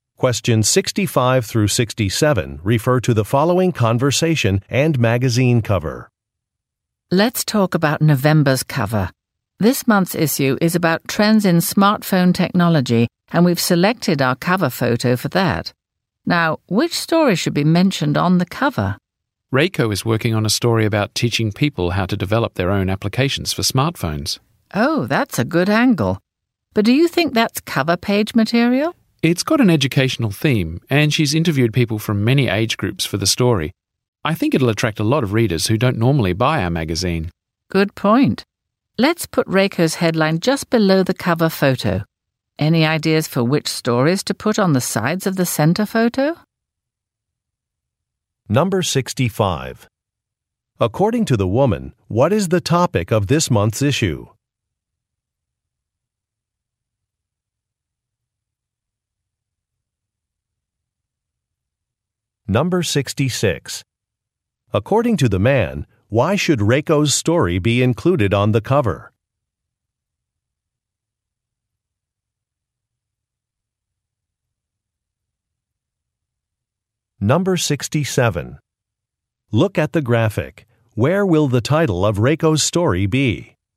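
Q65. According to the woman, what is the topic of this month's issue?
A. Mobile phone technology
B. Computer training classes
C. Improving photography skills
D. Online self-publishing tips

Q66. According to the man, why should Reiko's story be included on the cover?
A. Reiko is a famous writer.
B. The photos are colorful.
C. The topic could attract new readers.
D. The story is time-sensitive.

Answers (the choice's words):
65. Mobile phone technology
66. The topic could attract new readers.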